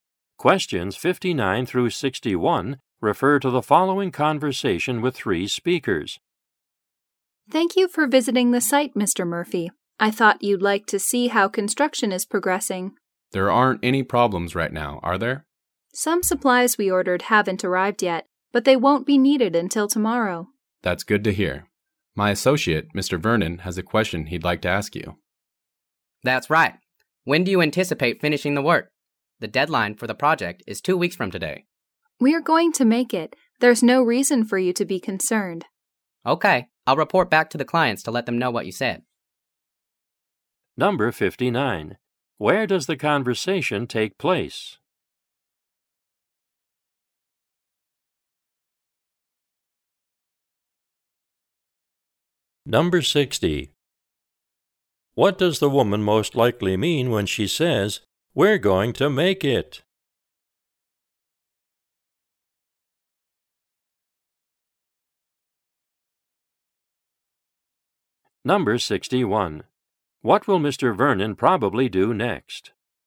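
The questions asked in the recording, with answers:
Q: Where does the conversation take place?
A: At a construction site

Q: What does the woman most likely mean when she says, "We're going to make it"?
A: The project will be finished by the deadline

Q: What will Mr. Vernon probably do next?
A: Report back to the clients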